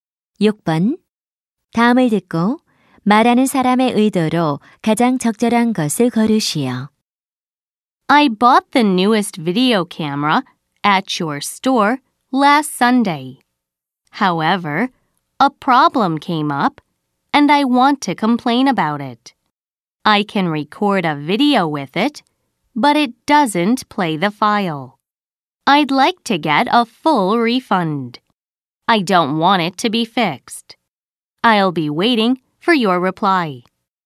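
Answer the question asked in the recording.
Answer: 항의 및 환불 요청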